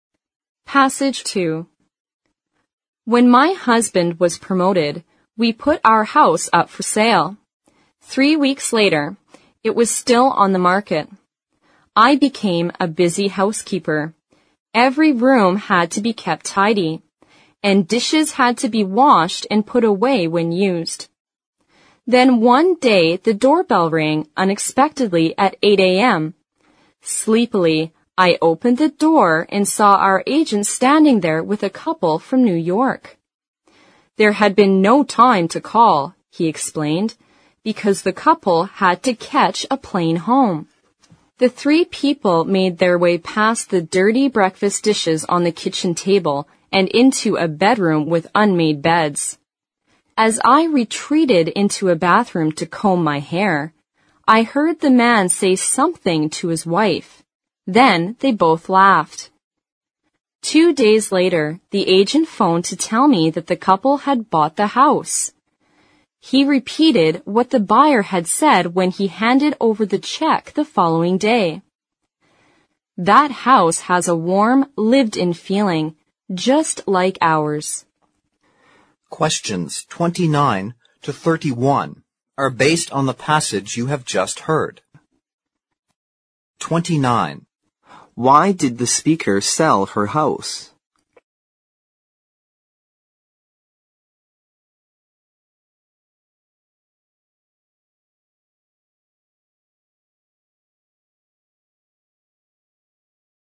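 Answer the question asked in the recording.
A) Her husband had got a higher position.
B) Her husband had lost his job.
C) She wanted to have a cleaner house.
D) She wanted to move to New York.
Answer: A) Her husband had got a higher position.

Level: 四级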